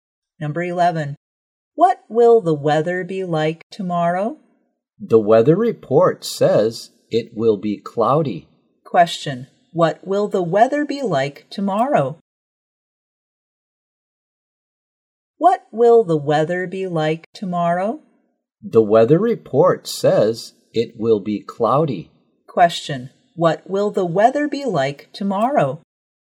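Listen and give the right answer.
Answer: Cloudy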